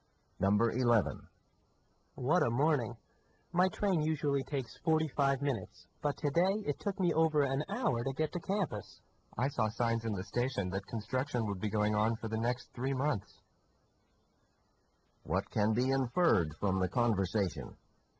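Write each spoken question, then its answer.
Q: What can be inferred from the conversation?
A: Construction delayed the train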